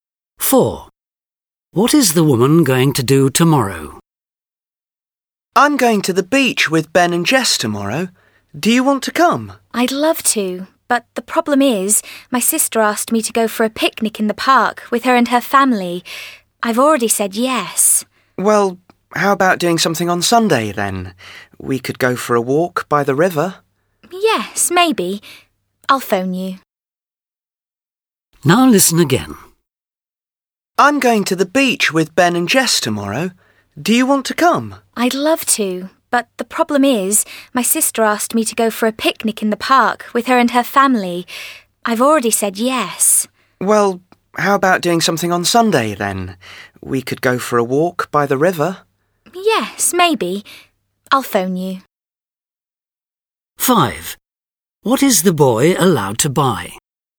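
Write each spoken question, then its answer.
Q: What is the woman going to do tomorrow?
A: Go for a picnic in the park with her sister's family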